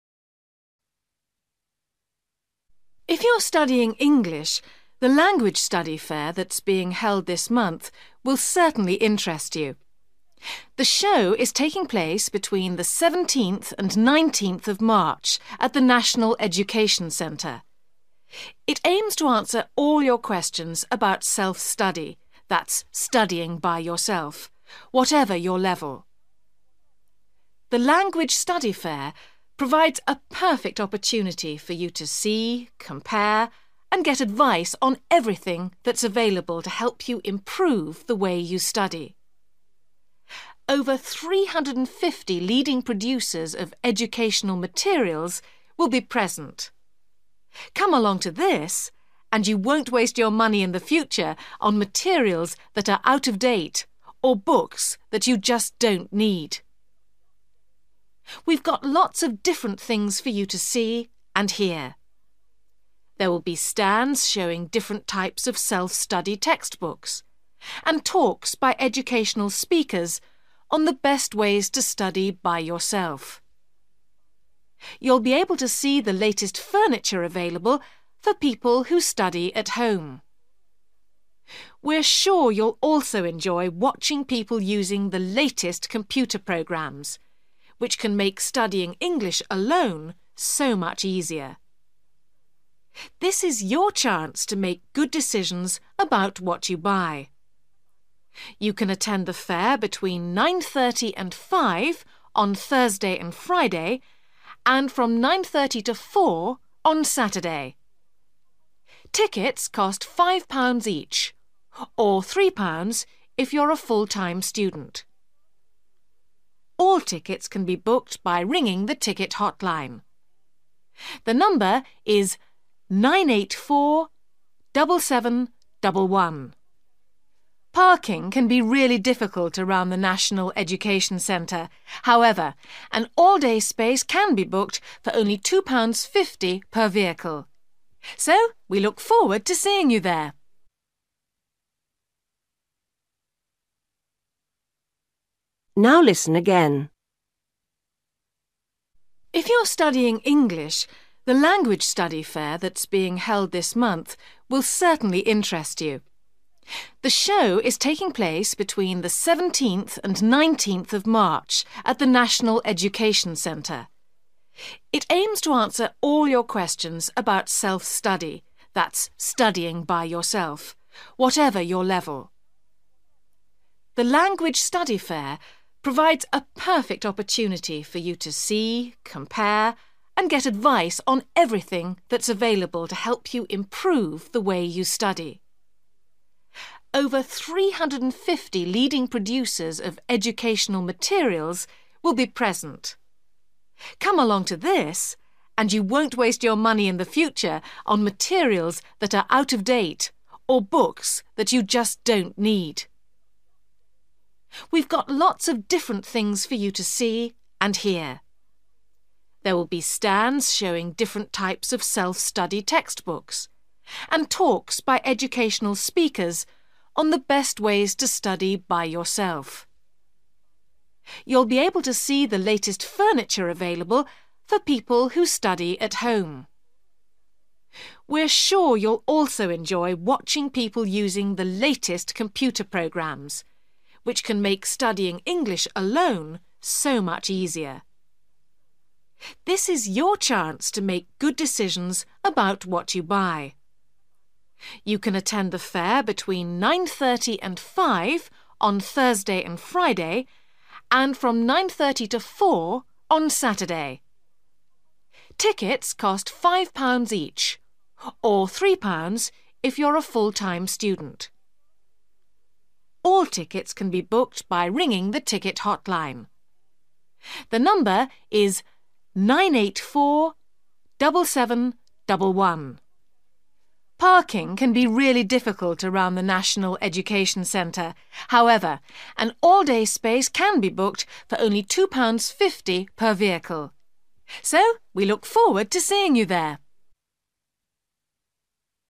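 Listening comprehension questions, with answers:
You will hear someone talking on the radio about a Language Study Fair. For each question, fill in the missing information in the numbered space.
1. Date: 17th to 19th (1)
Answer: March

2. (2) by educational speakers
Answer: talks

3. demonstrations of latest (3)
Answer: computer programs

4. 9.30 a.m. – 4.00 p.m. (4)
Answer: Saturday

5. or £3 for (5)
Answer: full-time students

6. Tickets can be booked by ringing the hotline on (6)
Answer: 984-7711

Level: Luyện nghe trình độ B1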